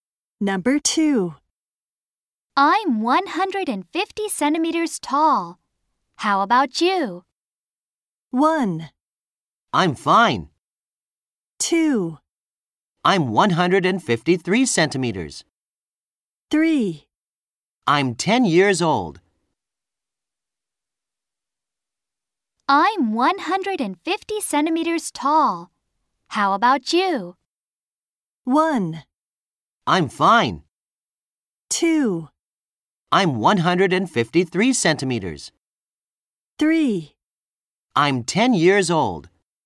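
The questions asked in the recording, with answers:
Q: I'm 150 centimeters tall. How about you?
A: 2: I'm 153 centimeters.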